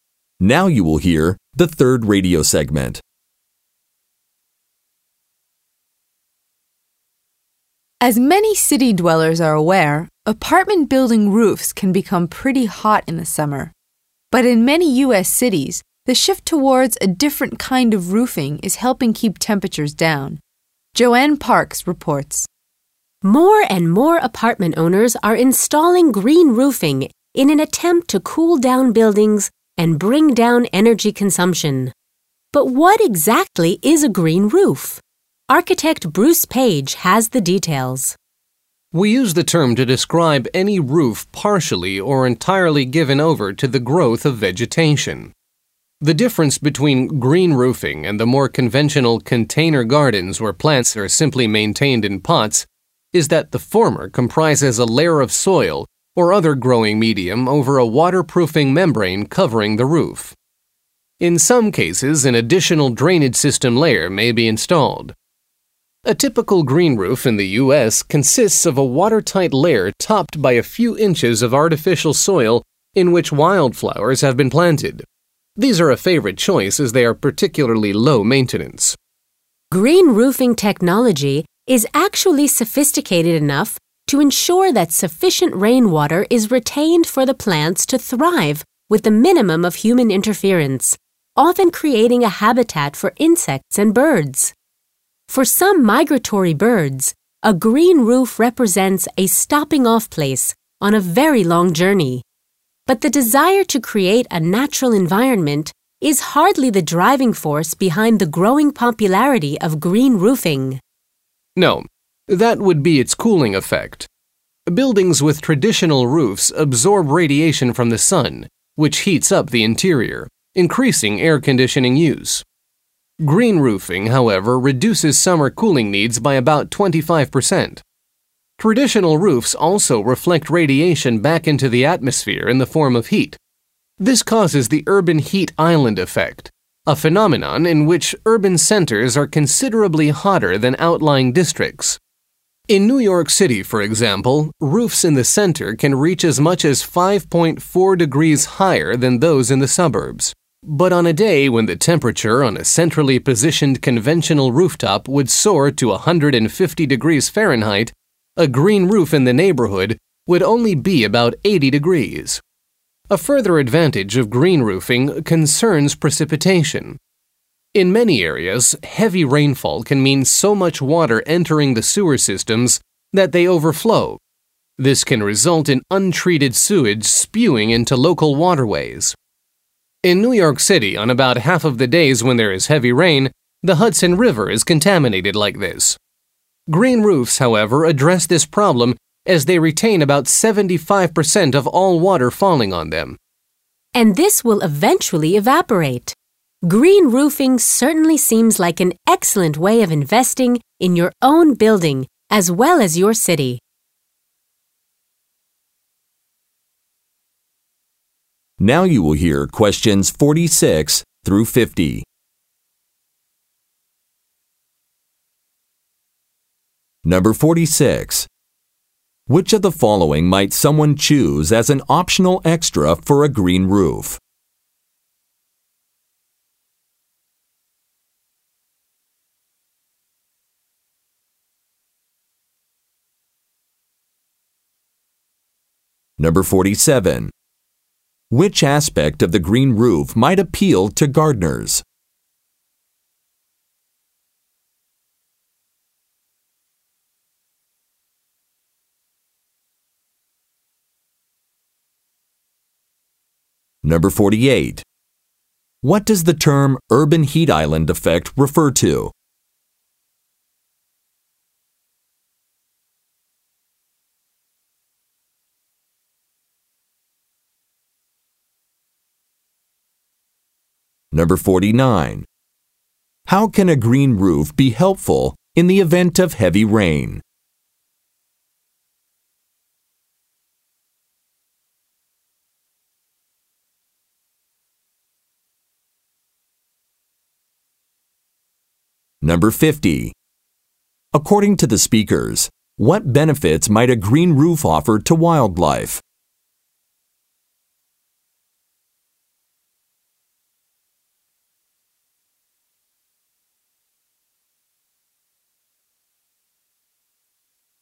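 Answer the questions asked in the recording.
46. An additional drainage system layer
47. It is low maintenance
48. Urban centers being considerably hotter than outlying districts
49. It retains about 75% of the water, preventing sewer overflow
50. A habitat for insects and birds and a stopping-off place for migratory birds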